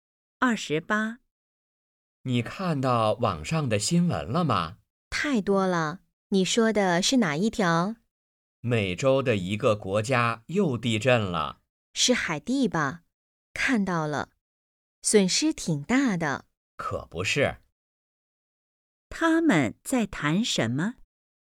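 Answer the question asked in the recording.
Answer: 海地地震的新闻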